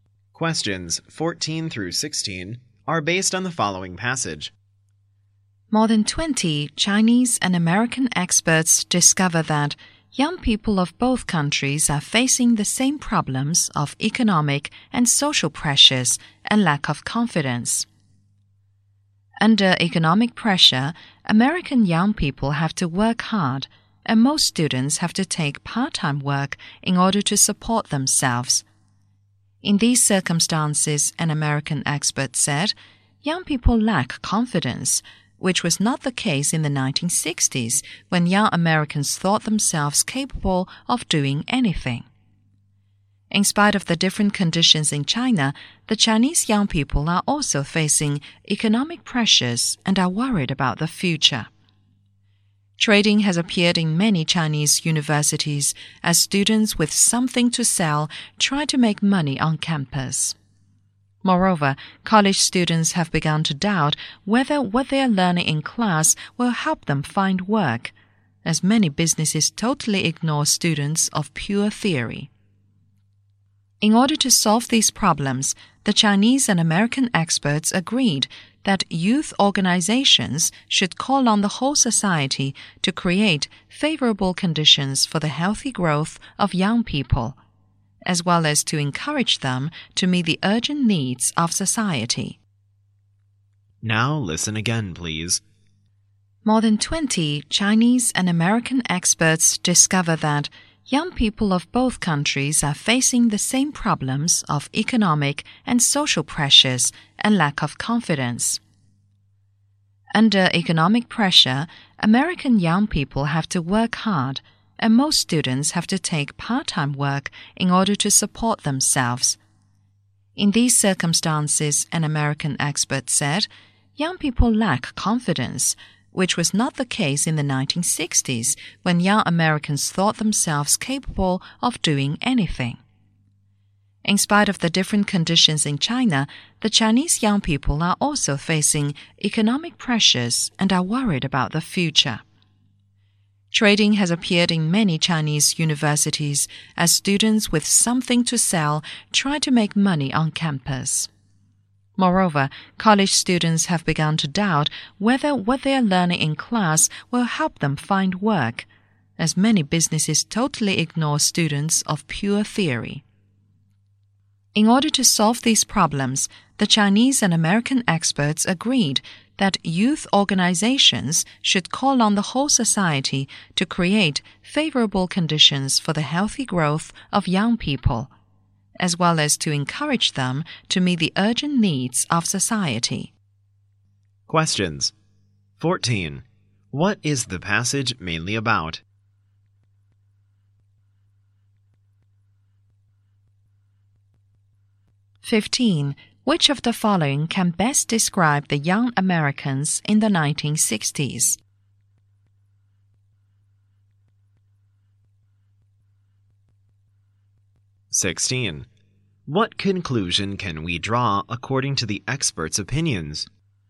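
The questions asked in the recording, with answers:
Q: What is the passage mainly about?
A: The same problems young people in China and America face

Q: Which of the following can best describe the young Americans in the 1960s?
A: Confident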